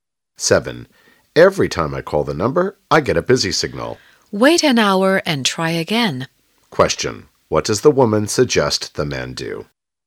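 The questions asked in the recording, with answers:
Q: What does the woman suggest the man do?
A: Call again in an hour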